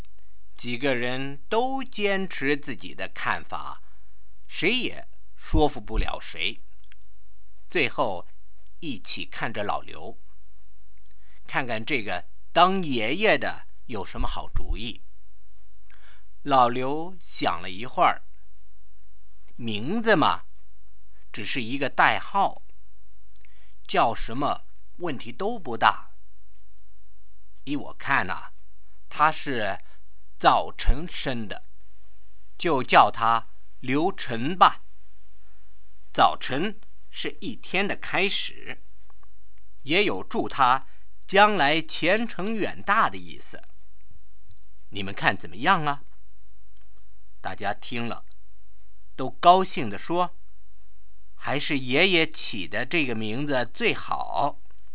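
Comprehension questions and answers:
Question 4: Why did everyone think the name that given by Grandfather was the best one?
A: She was born in the morning, so he named her Liu Chen (chen = morning). Morning is the start of the day, so the name also wishes her a bright future.

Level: 2nd Year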